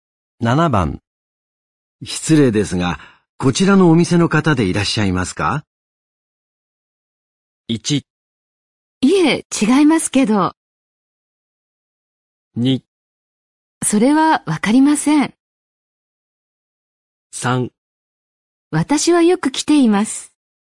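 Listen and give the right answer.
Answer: 1: いえ、違いますけど。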